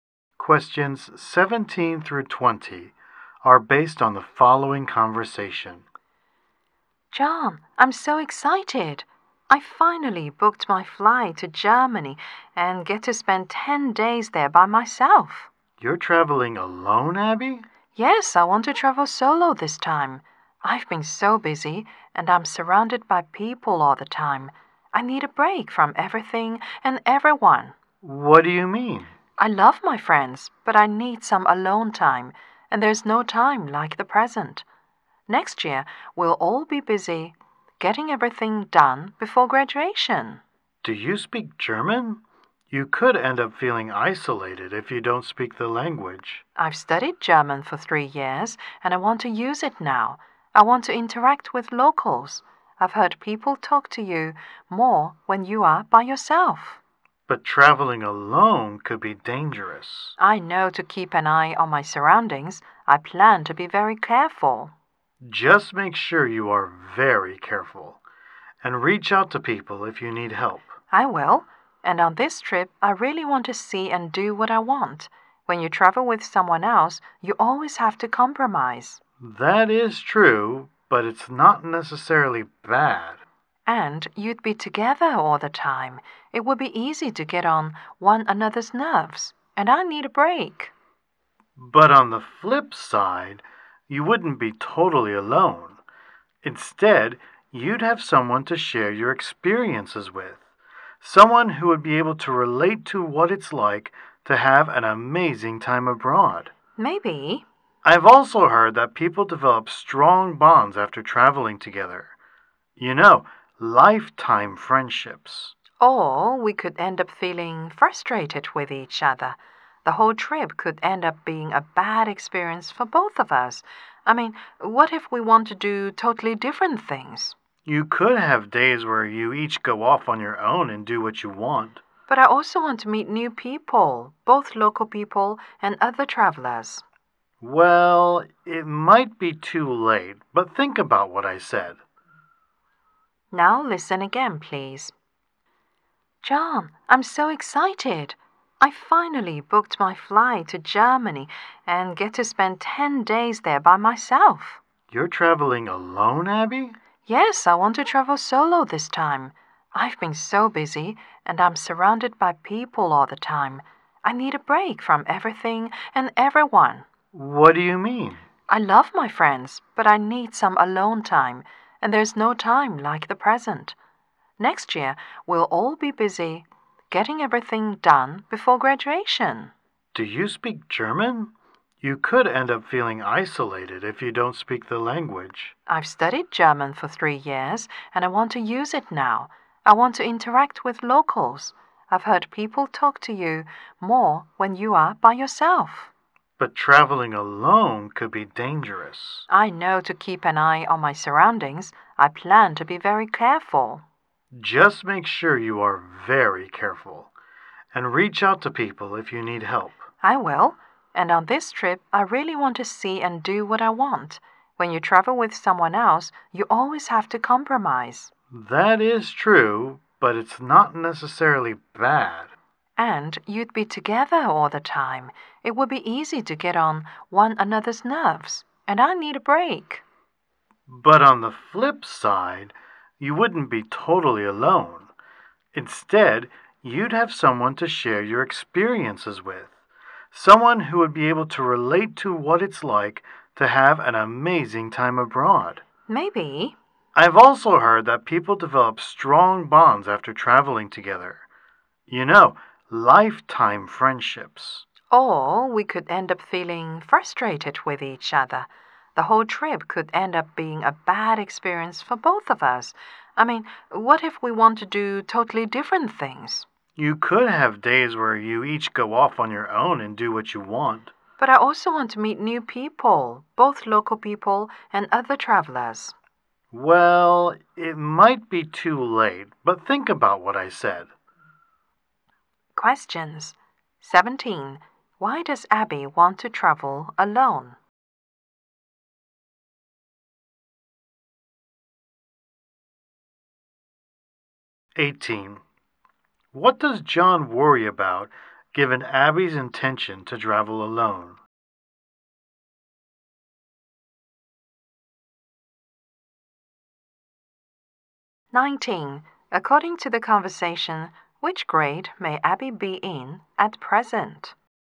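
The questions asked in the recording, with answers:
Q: Why does Abby want to travel alone?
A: She needs a break and some time alone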